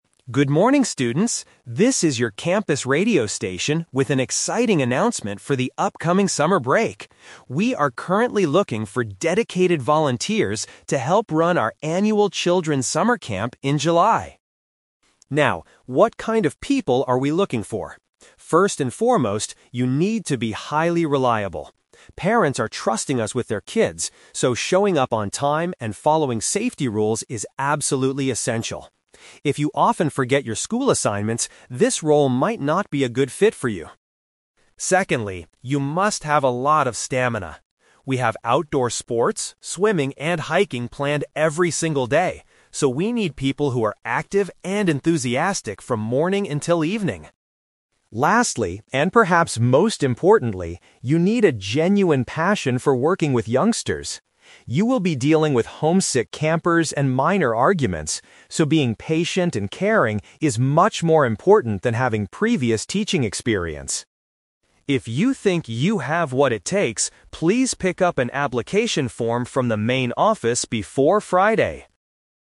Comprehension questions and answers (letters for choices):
Listen to a school radio announcement about a volunteering opportunity. For each question, choose the correct answer A, B, or (C).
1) What is the FIRST requirement for the volunteer position?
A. To be a dependable person who follows rules.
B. To finish all university homework assignments early.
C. To have experience communicating with parents.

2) Why do the volunteers need to be highly active?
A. Because they have to teach advanced sports classes.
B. Because the camp involves a lot of physical activities.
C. Because they need to stay awake late into the night.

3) What does the speaker say about dealing with the campers?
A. Volunteers must have formal experience as school teachers.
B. The children are usually very aggressive and difficult to manage.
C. Having a tolerant and kind attitude is the most valuable trait.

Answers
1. A
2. B
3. C

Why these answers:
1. The announcer says the first requirement is to be "highly reliable" and that "following safety rules is absolutely essential." The word "dependable" is a B1-level synonym for reliable.
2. The speaker says volunteers need "a lot of stamina" because there are "outdoor sports, swimming, and hiking planned every single day." These are all physical activities.
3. The announcer states that "being patient and caring is much more important than having previous teaching experience." The words "tolerant and kind" paraphrase "patient and caring."

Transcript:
School Radio Announcer: Good morning, students! This is your campus radio station with an exciting announcement for the upcoming summer break. We are currently looking for dedicated volunteers to help run our annual Children's Summer Camp in July.
Now, what kind of people are we looking for? First and foremost, you need to be highly reliable. Parents are trusting us with their kids, so showing up on time and following safety rules is absolutely essential. If you often forget your school assignments, this role might not be a good fit for you.
Secondly, you must have a lot of stamina. We have outdoor sports, swimming, and hiking planned every single day, so we need people who are active and enthusiastic from morning until evening.
Lastly, and perhaps most importantly, you need a genuine passion for working with youngsters. You will be dealing with homesick campers and minor arguments, so being patient and caring is much more important than having previous teaching experience.
If you think you have what it takes, please pick up an application form from the main office before Friday!